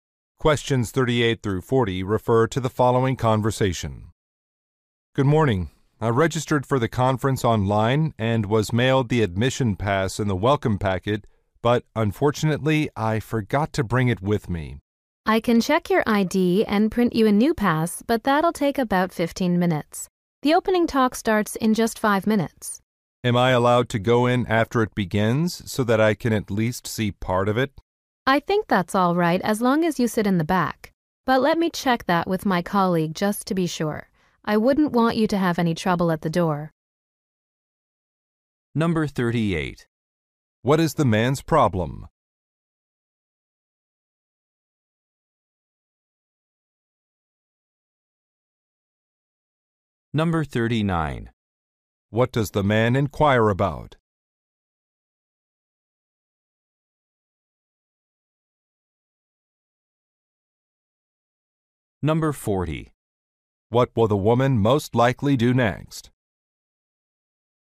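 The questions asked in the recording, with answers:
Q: What is the man's problem?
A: He forgot his admission pass

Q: What does the man inquire about?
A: Whether he can enter the talk after it begins

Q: What will the woman most likely do next?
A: Check with a colleague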